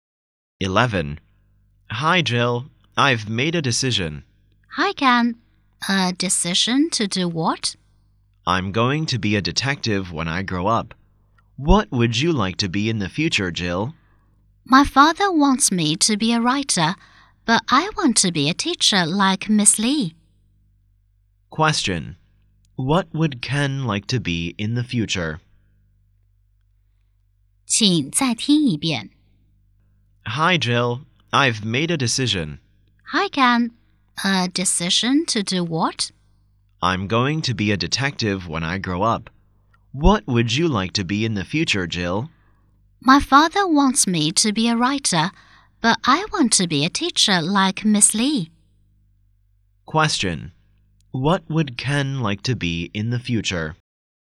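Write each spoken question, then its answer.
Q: What would Ken like to be in the future?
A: A detective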